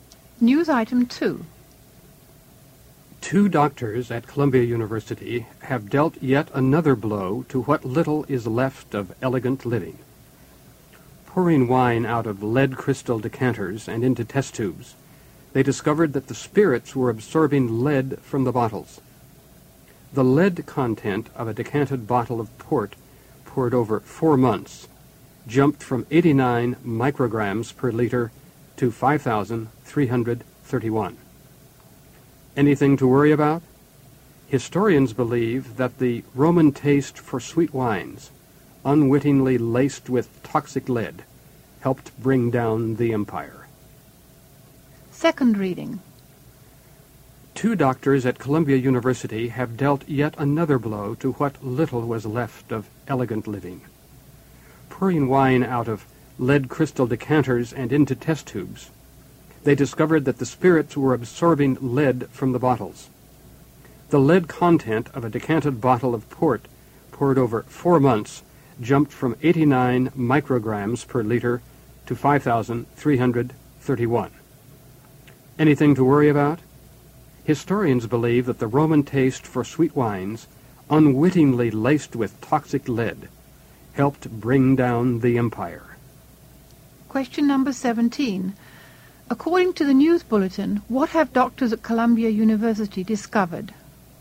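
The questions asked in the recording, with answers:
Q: According to the news bulletin, what have doctors at Columbia University discovered?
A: Wine absorbs lead from lead crystal decanters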